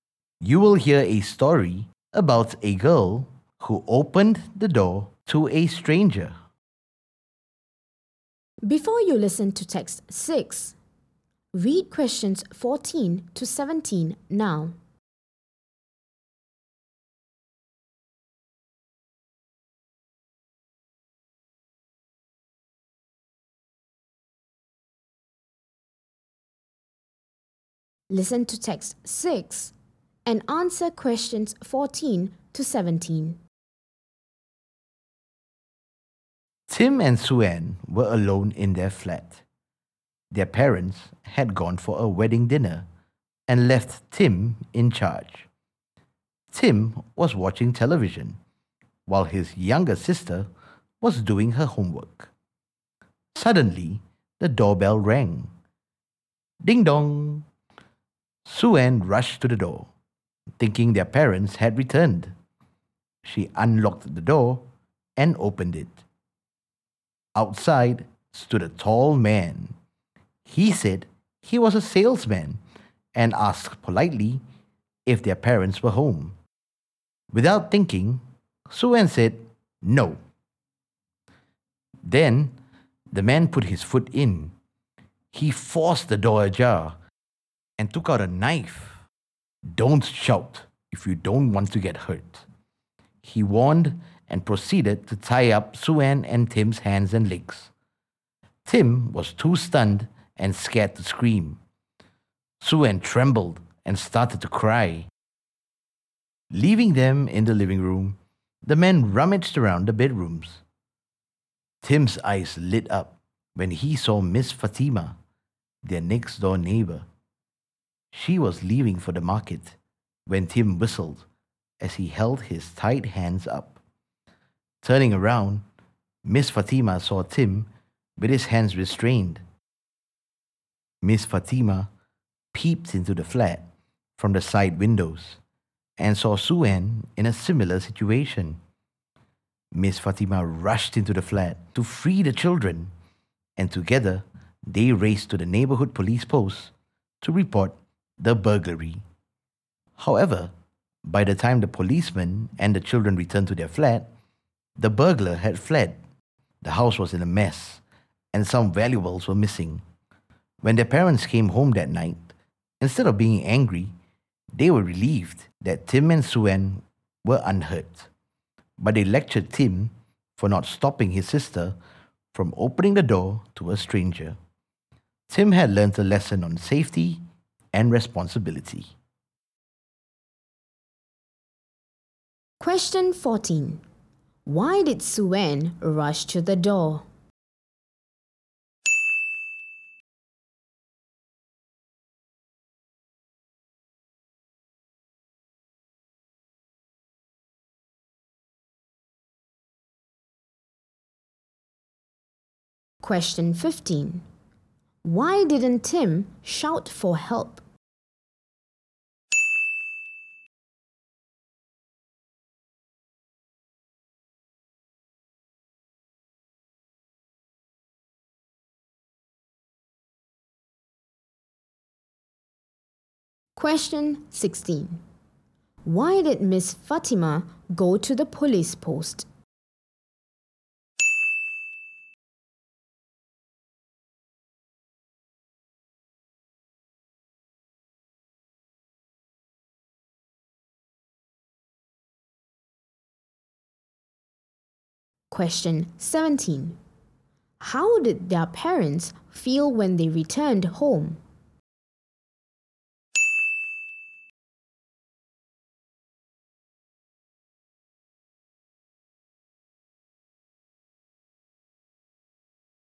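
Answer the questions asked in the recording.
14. She thought their parents had returned.
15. He was too stunned and scared to scream.
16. To report the burglary.
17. Relieved that the children were unhurt.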